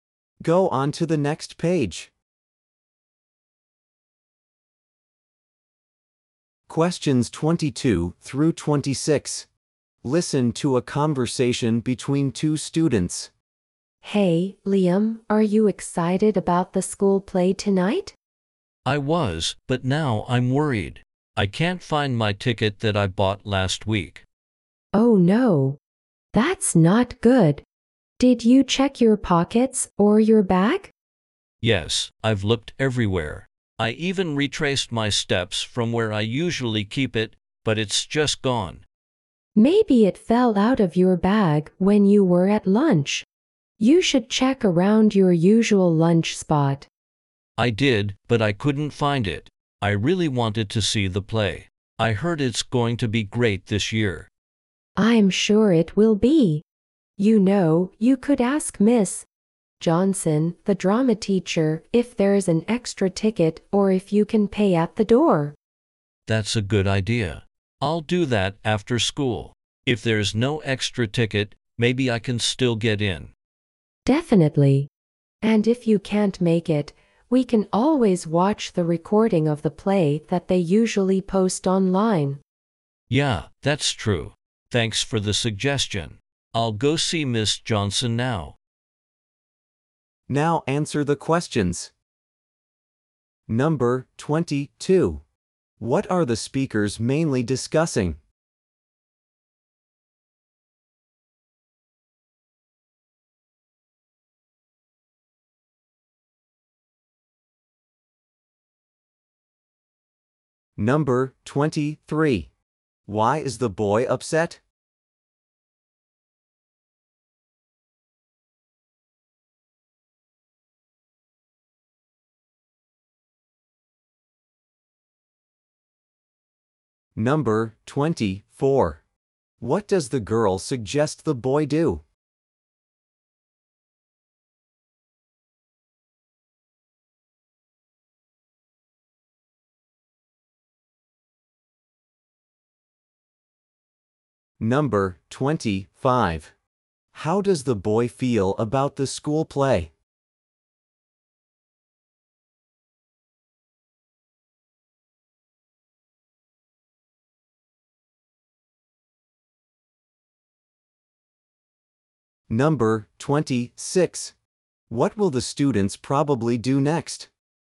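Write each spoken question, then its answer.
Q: What are the speakers mainly discussing?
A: The boy's lost ticket for the school play

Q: Why is the boy upset?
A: He can't find his ticket

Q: What does the girl suggest the boy do?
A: Ask Miss Johnson, the drama teacher, about an extra ticket

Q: How does the boy feel about the school play?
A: He really wants to see it

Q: What will the students probably do next?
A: The boy will go see Miss Johnson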